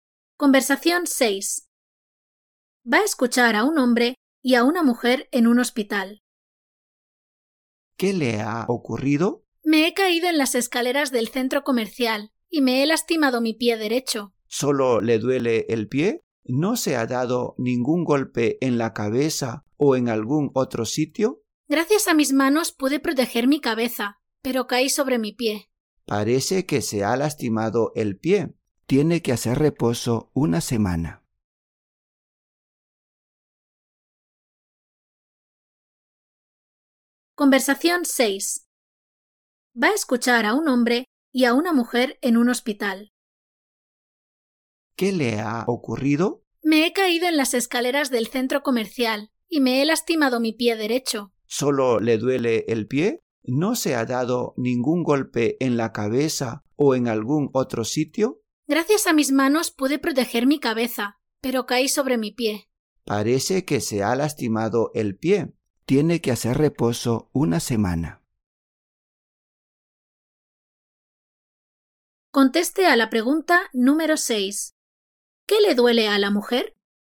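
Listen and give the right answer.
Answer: El pie derecho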